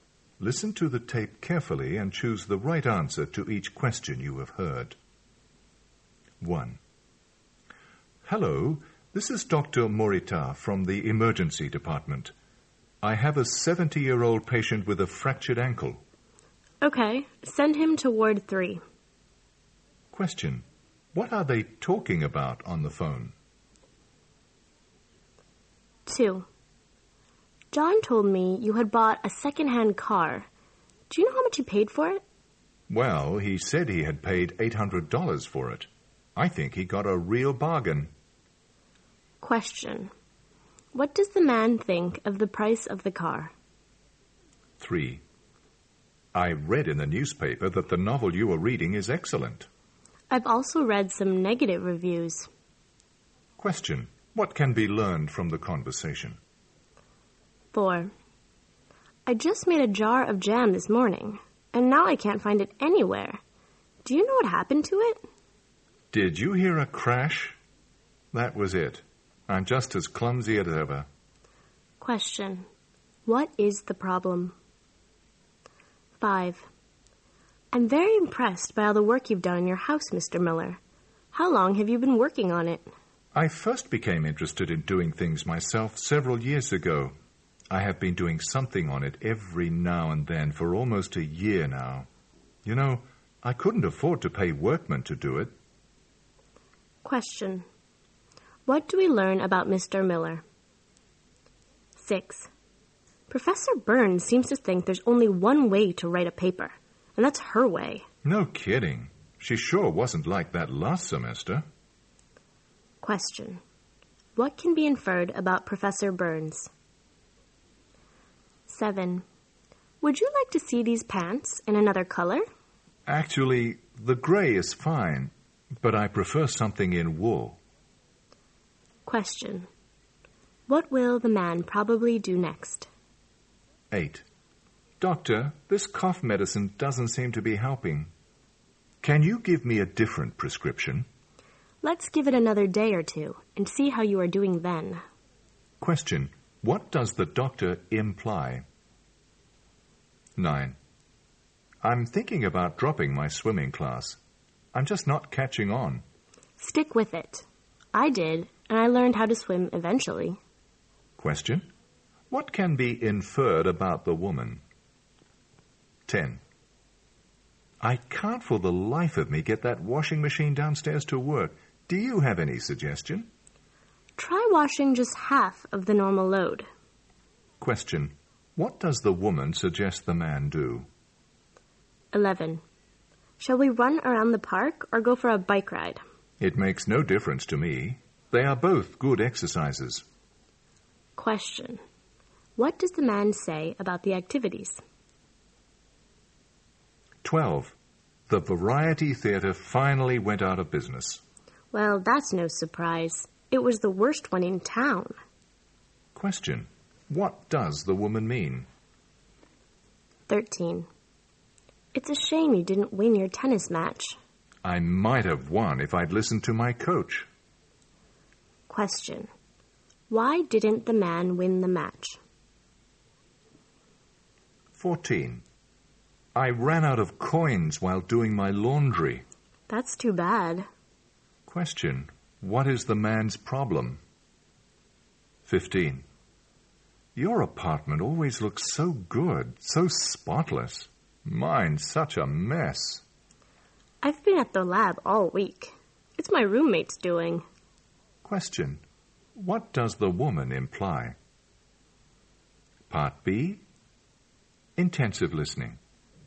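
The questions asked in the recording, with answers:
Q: What are they talking about on the phone?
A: Where to send a patient with a fractured ankle (Ward 3)

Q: What does the man think of the price of the car?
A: It was a real bargain

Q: What can be learned from the conversation?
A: The novel has received both good and bad reviews

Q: What is the problem?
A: The jar of jam was dropped and broken

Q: What does the doctor imply?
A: The man should keep taking the medicine for another day or two

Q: What can be inferred about the woman?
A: She also had trouble learning to swim at first

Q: What does the woman suggest the man do?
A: Wash a smaller load

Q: What does the man say about the activities?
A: He doesn't mind which; both are good exercise

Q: What does the woman mean?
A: She isn't surprised the theatre closed because it was the worst in town

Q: Why didn't the man win the match?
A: He didn't listen to his coach

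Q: Question, what is the man's problem?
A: He has no more coins for his laundry

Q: Question, what does the woman imply?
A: Her roommate keeps the apartment clean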